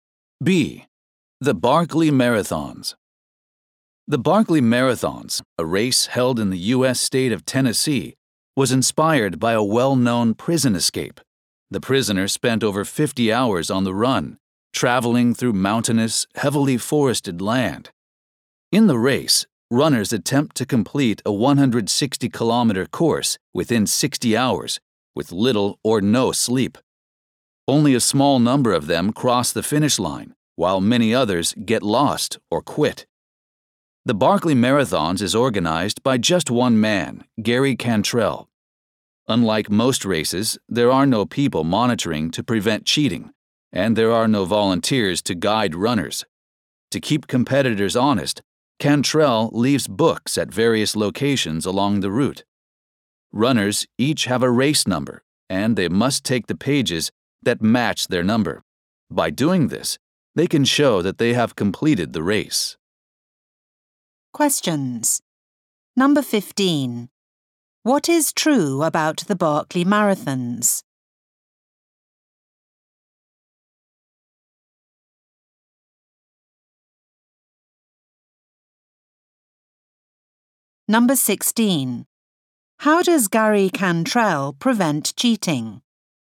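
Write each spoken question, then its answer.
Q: What is true about the Barclay Marathons?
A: It was inspired by a prison escape, and only a few runners finish the 160 km course within 60 hours.

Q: How does Gary Cantrell prevent cheating?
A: He leaves books along the route, and runners must take the pages matching their race number.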